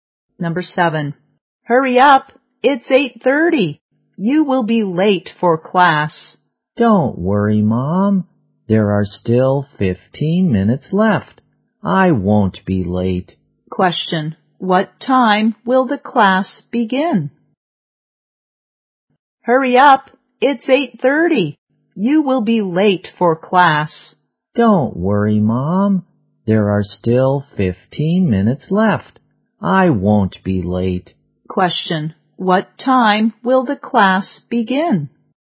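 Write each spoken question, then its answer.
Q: What time will the class begin?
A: 8:45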